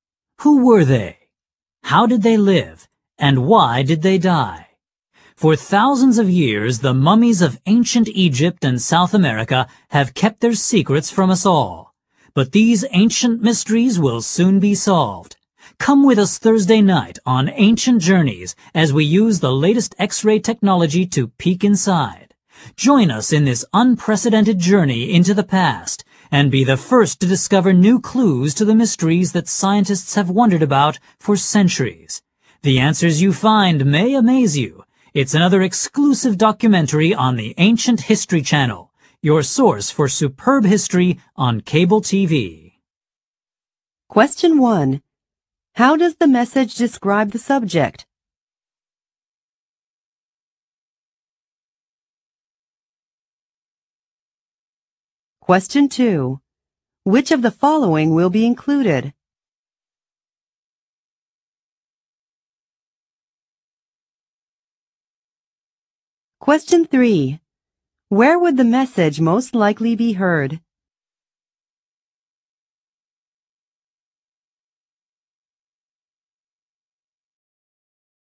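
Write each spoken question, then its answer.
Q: Where would the message most likely be heard?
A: On television (a cable TV history channel)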